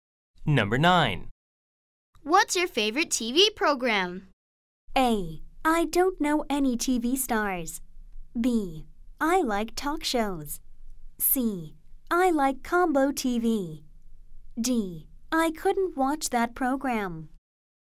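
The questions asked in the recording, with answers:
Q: What's your favorite TV program?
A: B: I like talk shows.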